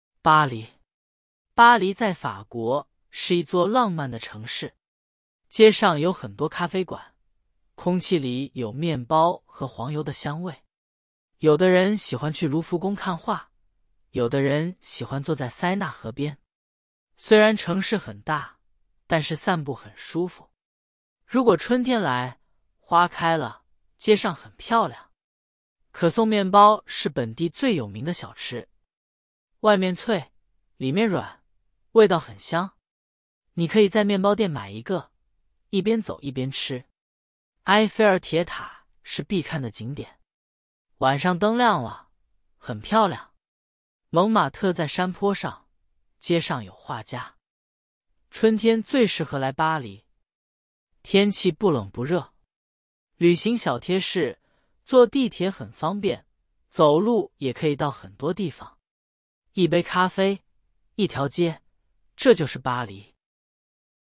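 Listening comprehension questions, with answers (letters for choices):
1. 巴黎在德国。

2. 街上有很多咖啡馆。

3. 可颂面包是本地最有名的饮料。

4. 埃菲尔铁塔晚上灯亮了很漂亮。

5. 蒙马特在河边。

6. 旅行小贴士建议坐地铁。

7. 巴黎是一座什么样的城市?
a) 浪漫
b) 古老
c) 现代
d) 安静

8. 塞纳河边可以做什么?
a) 看画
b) 坐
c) 买面包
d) 看铁塔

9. 可颂面包在哪里买?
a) 咖啡馆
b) 面包店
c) 博物馆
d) 铁塔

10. 蒙马特在什么地方?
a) 河边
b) 山坡上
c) 市中心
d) 海边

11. 什么季节最适合来巴黎?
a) 春天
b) 夏天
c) 秋天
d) 冬天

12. 巴黎的天气怎么样?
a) 很冷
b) 很热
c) 不冷不热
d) 很舒服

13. 巴黎在哪个国家?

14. 巴黎的空气中有什么香味?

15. 有的人喜欢去卢浮宫做什么?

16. 可颂面包的特点是什么?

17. 埃菲尔铁塔什么时候很漂亮?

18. 旅行小贴士建议怎么出行?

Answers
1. 错
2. 对
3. 错
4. 对
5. 错
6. 对
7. a
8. b
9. b
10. b
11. a
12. c
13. 法国
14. 面包和黄油的香味
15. 看画
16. 外面脆,里面软,味道很香
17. 晚上灯亮了
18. 坐地铁,也可以走路

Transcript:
巴黎
巴黎在法国,是一座浪漫的城市。街上有很多咖啡馆,空气里有面包和黄油的香味。
有的人喜欢去卢浮宫看画,有的人喜欢坐在塞纳河边。虽然城市很大,但是散步很舒服。如果春天来,花开了,街上很漂亮。
可颂面包是本地最有名的小吃。外面脆,里面软,味道很香。你可以在面包店买一个,一边走一边吃。
埃菲尔铁塔是必看的景点。晚上灯亮了,很漂亮。蒙马特在山坡上,街上有画家。
春天最适合来巴黎。天气不冷不热。旅行小贴士:坐地铁很方便,走路也可以到很多地方。
一杯咖啡,一条街,这就是巴黎。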